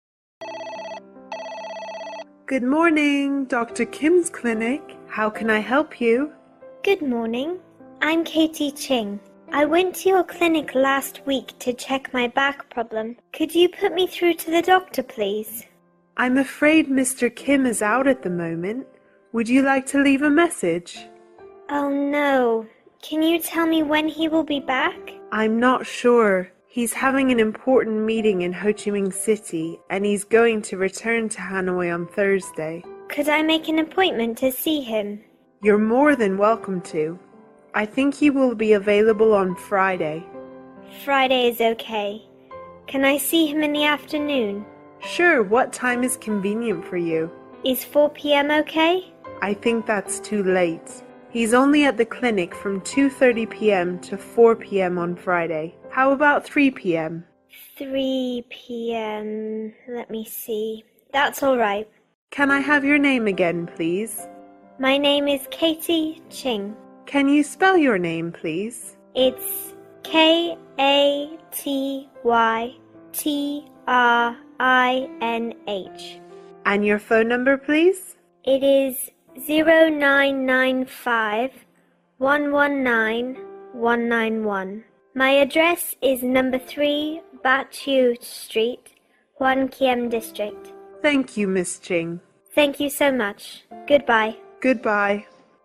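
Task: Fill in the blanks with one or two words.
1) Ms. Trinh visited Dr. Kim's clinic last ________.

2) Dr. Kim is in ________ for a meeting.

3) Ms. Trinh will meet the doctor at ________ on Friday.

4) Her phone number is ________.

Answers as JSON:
{"1": "week", "2": "Ho Chi Minh City", "3": "3 p.m.", "4": "0995 119 191"}

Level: lớp 8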